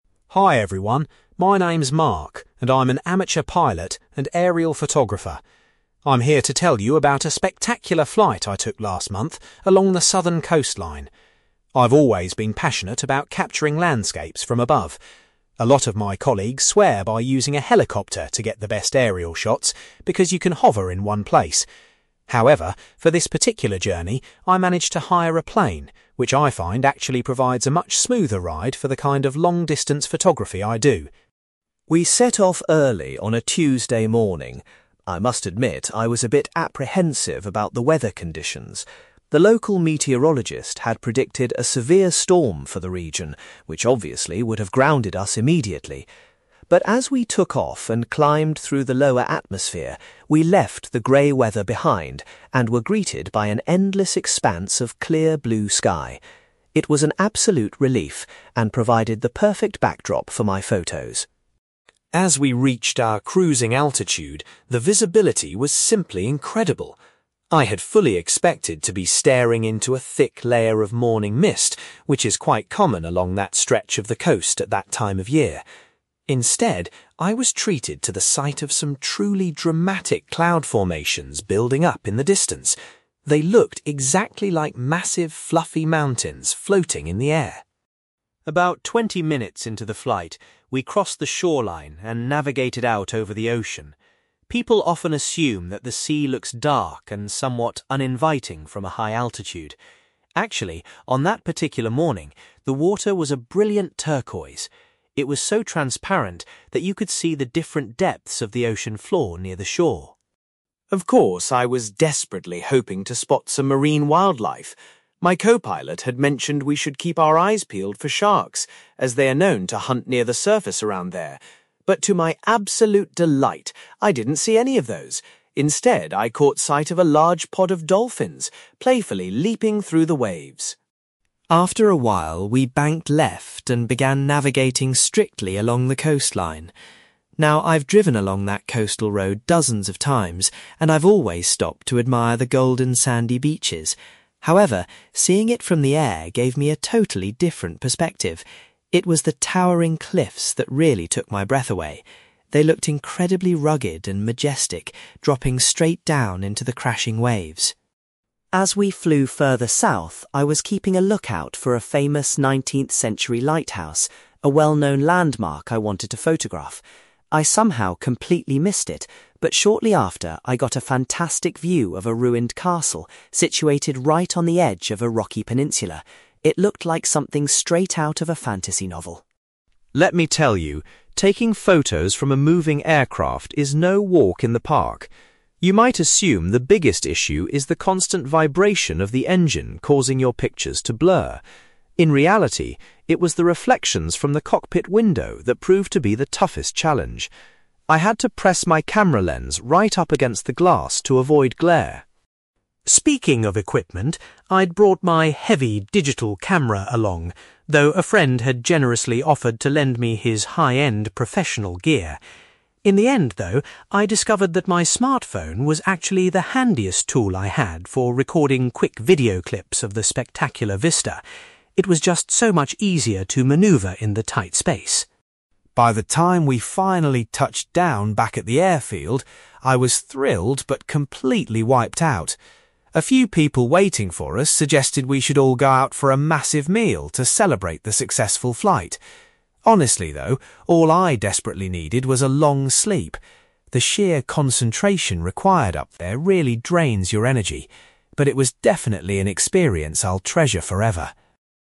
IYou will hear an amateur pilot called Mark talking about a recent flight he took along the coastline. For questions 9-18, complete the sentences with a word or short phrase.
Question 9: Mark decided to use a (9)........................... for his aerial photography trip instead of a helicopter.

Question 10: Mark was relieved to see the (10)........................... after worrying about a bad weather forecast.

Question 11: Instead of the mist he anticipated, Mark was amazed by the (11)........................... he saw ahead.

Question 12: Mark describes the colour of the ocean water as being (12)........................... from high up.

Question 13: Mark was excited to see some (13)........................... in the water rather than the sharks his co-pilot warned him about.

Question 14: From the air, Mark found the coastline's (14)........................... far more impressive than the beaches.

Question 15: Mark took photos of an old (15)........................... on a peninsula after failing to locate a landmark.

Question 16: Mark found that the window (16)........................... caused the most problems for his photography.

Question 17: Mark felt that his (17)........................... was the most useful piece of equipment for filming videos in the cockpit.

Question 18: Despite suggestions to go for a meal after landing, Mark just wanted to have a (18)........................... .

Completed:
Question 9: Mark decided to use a plane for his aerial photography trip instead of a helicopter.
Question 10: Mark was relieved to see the blue sky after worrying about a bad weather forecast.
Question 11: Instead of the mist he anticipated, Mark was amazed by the cloud formations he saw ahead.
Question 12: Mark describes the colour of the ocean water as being turquoise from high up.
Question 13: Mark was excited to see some dolphins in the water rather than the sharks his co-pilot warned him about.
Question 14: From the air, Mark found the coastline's cliffs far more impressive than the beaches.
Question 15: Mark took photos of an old castle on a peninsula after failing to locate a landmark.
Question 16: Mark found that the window reflections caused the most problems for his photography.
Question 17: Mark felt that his smartphone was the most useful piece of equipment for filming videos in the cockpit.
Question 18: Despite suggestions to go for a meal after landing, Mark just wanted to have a sleep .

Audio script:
Mark: Hi everyone, my name is Mark, and I'm an amateur pilot and aerial photographer. I'm here to tell you about a spectacular flight I took last month along the southern coastline. I've always been passionate about capturing landscapes from above. A lot of my colleagues swear by using a helicopter to get the best aerial shots because you can hover in one place. However, for this particular journey, I managed to hire a plane, which I find actually provides a much smoother ride for the kind of long-distance photography I do.
We set off early on a Tuesday morning. I must admit, I was a bit apprehensive about the weather conditions. The local meteorologist had predicted a severe storm for the region, which obviously would have grounded us immediately. But as we took off and climbed through the lower atmosphere, we left the grey weather behind and were greeted by an endless expanse of clear blue sky. It was an absolute relief and provided the perfect backdrop for my photos.
As we reached our cruising altitude, the visibility was simply incredible. I had fully expected to be staring into a thick layer of morning mist, which is quite common along that stretch of the coast at that time of year. Instead, I was treated to the sight of some truly dramatic cloud formations building up in the distance. They looked exactly like massive, fluffy mountains floating in the air.
About twenty minutes into the flight, we crossed the shoreline and navigated out over the ocean. People often assume that the sea looks dark and somewhat uninviting from a high altitude. Actually, on that particular morning, the water was a brilliant turquoise. It was so transparent that you could see the different depths of the ocean floor near the shore.
Of course, I was desperately hoping to spot some marine wildlife. My co-pilot had mentioned we should keep our eyes peeled for sharks, as they are known to hunt near the surface around there. But to my absolute delight, I didn't see any of those; instead, I caught sight of a large pod of dolphins playfully leaping through the waves.
After a while, we banked left and began navigating strictly along the coastline. Now, I've driven along that coastal road dozens of times, and I've always stopped to admire the golden sandy beaches. However, seeing it from the air gave me a totally different perspective. It was the towering cliffs that really took my breath away. They looked incredibly rugged and majestic dropping straight down into the crashing waves.
As we flew further south, I was keeping a lookout for a famous 19th-century lighthouse, a well-known landmark I wanted to photograph. I somehow completely missed it, but shortly after, I got a fantastic view of a ruined castle situated right on the edge of a rocky peninsula. It looked like something straight out of a fantasy novel.
Let me tell you, taking photos from a moving aircraft is no walk in the park. You might assume the biggest issue is the constant vibration of the engine causing your pictures to blur. In reality, it was the reflections from the cockpit window that proved to be the toughest challenge. I had to press my camera lens right up against the glass to avoid glare.
Speaking of equipment, I'd brought my heavy digital camera along, though a friend had generously offered to lend me his high-end professional gear. In the end, though, I discovered that my smartphone was actually the handiest tool I had for recording quick video clips of the spectacular vista. It was just so much easier to maneuver in the tight space.
By the time we finally touched down back at the airfield, I was thrilled but completely wiped out. A few people waiting for us suggested we should all go out for a massive meal to celebrate the successful flight. Honestly, though, all I desperately needed was a long sleep. The sheer concentration required up there really drains your energy. But it was definitely an experience I'll treasure forever.

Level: B2